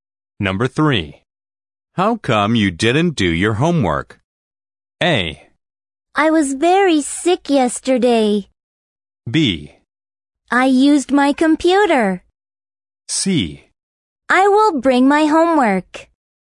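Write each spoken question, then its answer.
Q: How come you didn't do your homework?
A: A: I was very sick yesterday.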